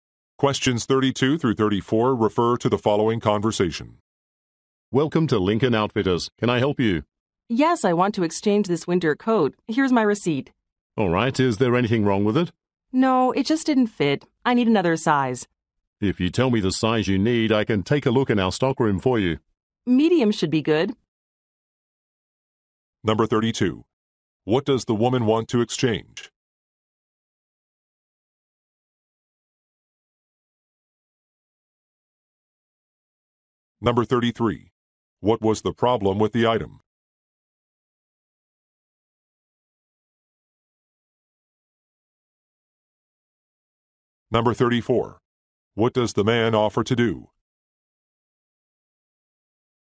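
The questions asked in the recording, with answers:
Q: What does the woman want to exchange?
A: A winter coat

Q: What was the problem with the item?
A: It didn't fit; wrong size

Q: What does the man offer to do?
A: Check the stockroom for another size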